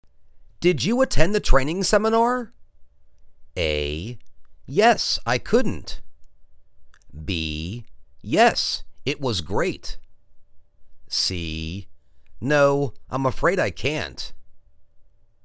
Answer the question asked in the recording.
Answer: Yes. It was great!